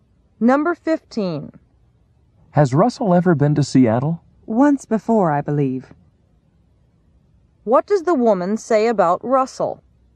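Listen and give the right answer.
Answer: She thinks he has been to Seattle once.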